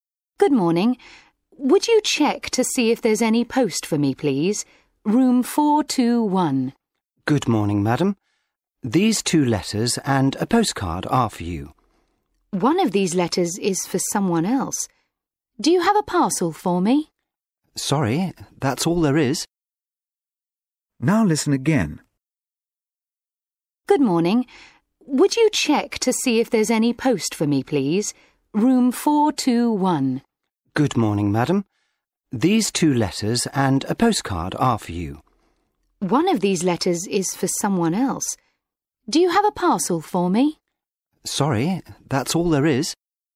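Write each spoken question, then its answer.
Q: What did the woman receive in the post?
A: a letter and a postcard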